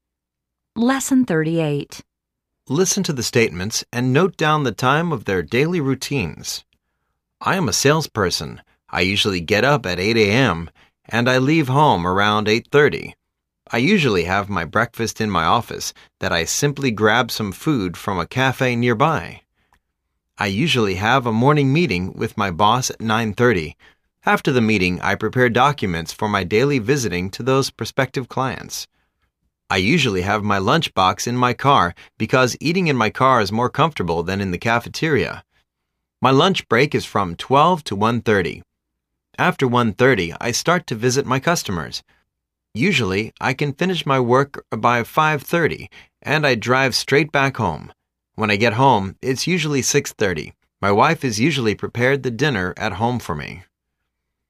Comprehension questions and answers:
Listen to the statements and note down the time of their daily routines.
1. He gets up at______________.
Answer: 8:00am

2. He leaves home at______________.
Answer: 8:30am

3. His morning meeting is at______________.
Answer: 9:30am

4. His lunch break is at______________.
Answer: 12:00am

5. He arrives home at______________.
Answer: 6:30am

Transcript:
And, I leave home around 8:30. I usually have my breakfast in my office that I simply grab some food from a cafe nearby. I usually have a morning meeting with my boss at 9:30. After them meeting, I prepare documents for my daily visiting to those prospective clients.
I usually have my lunch box in my car because eating in my car is more comfortable than in the cafeteria. After l:30, I start to visit my customers. Usually I can finish my work by 5:30. And, I drive straight back home. When I get home, it's usually 6:30. My wife is usually prepared the dinner at home for me.